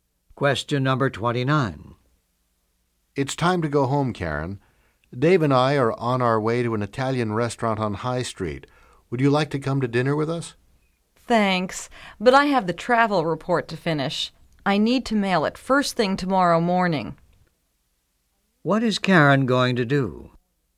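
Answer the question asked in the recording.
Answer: Stay and finish the travel report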